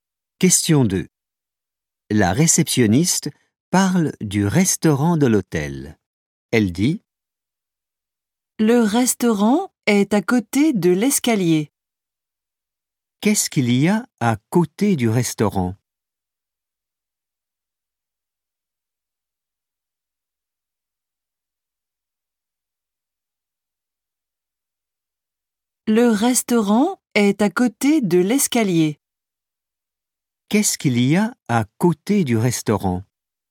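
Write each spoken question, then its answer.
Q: Qu'est-ce qu'il y a à côté du restaurant?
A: L'escalier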